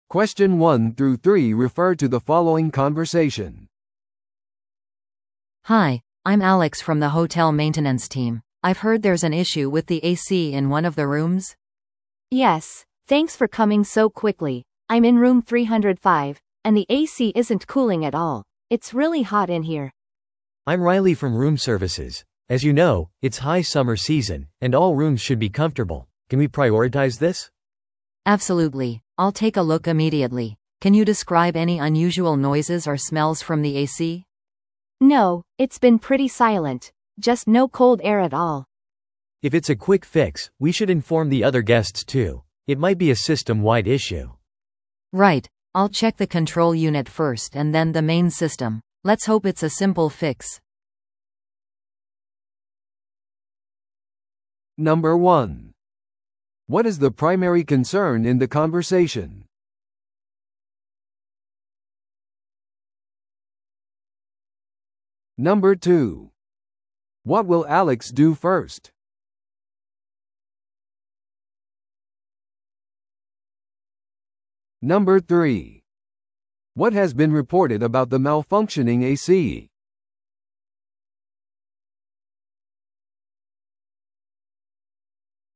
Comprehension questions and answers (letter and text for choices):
Listen to the audio below and answer the questions.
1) What is the primary concern in the conversation?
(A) ホテルの部屋のエアコンの故障。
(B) 部屋が冷えすぎている。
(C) ルームサービスの遅延。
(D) ピークシーズン中の部屋予約に関する問題。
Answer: (A) ホテルの部屋のエアコンの故障。

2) What will Alex do first?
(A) ゲストをホテルから避難させる。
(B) エアコンの制御ユニットをチェックする。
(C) 他のゲストにエアコンの問題を知らせる。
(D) すべての部屋を個別に検査する。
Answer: (B) エアコンの制御ユニットをチェックする。

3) What has been reported about the malfunctioning AC?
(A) 変な音がする。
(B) 変なにおいがする。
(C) 冷たい空気を出していない。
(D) 水が漏れている。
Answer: (C) 冷たい空気を出していない。

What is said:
A: Hi, I'm Alex from the hotel maintenance team. I've heard there's an issue with the AC in one of the rooms?
B: Yes, thanks for coming so quickly. I'm in room 305, and the AC isn't cooling at all. It's really hot in here.
C: I'm Riley from room services. As you know, it's high summer season, and all rooms should be comfortable. Can we prioritize this?
A: Absolutely, I'll take a look immediately. Can you describe any unusual noises or smells from the AC?
B: No, it's been pretty silent. Just no cold air at all.
C: If it's a quick fix, we should inform the other guests too. It might be a system-wide issue.
A: Right, I'll check the control unit first and then the main system. Let's hope it's a simple fix.